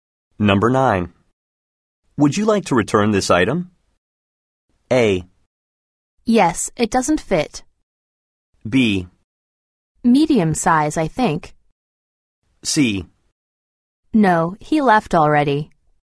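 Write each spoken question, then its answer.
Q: Would you like to return this item?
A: A: Yes, it doesn't fit.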